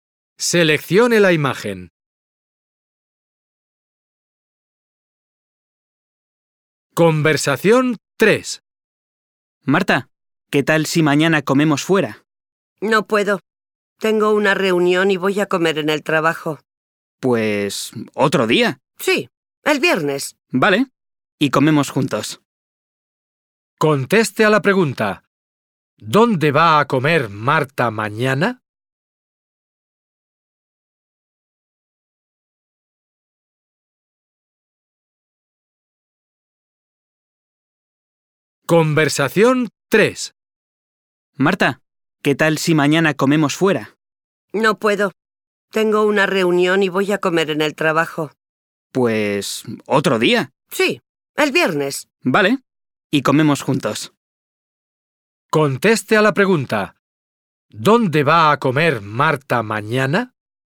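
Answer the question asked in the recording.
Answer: En el trabajo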